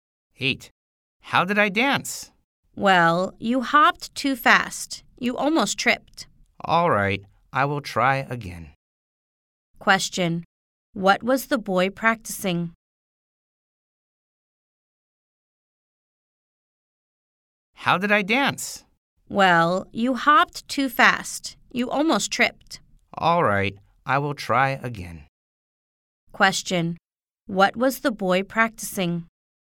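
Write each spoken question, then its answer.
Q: What was the boy practicing?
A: Dancing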